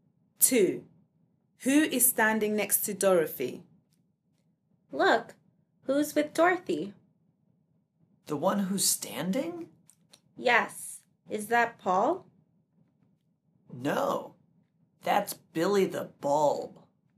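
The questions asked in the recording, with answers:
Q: Who is standing next to Dorothy?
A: Billy the Bulb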